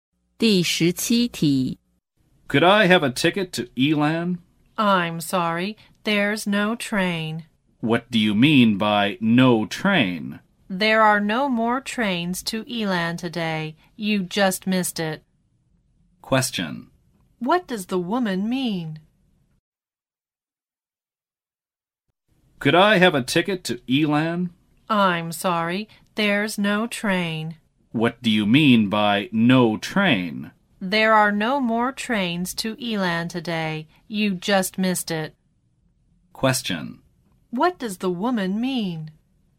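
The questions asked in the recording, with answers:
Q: What does the woman mean?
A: There are no more trains to Elan today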